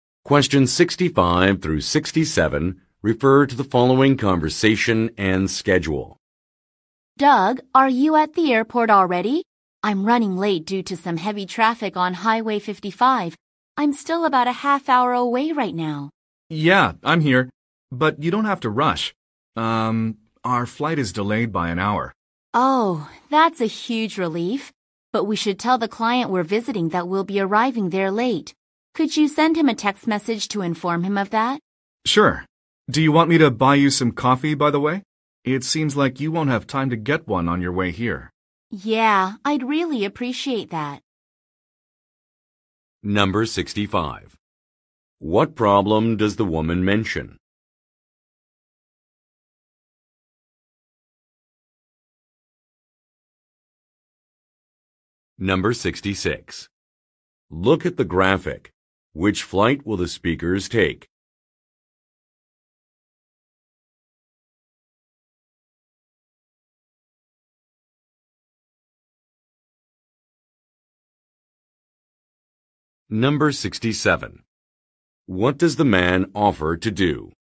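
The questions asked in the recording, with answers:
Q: What problem does the woman mention?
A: She is stuck in heavy traffic and running late.

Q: What does the man offer to do?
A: Buy her some coffee.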